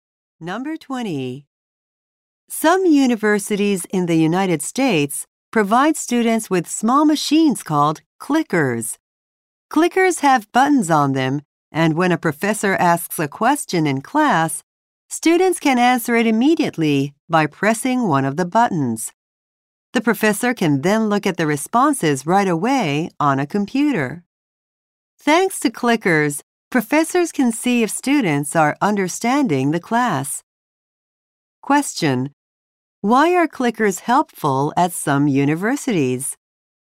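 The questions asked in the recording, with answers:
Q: Why are clickers helpful at some universities?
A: Professors can see if students understand the class.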